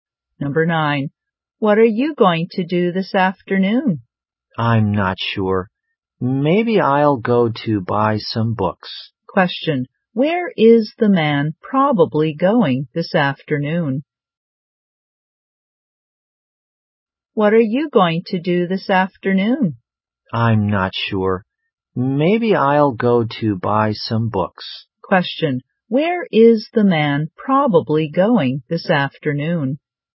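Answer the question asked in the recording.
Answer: To a bookstore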